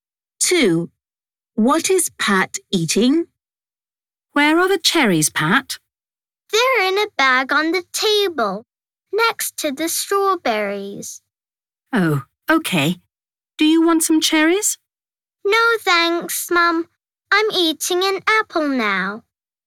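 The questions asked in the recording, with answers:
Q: What is Pat eating?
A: an apple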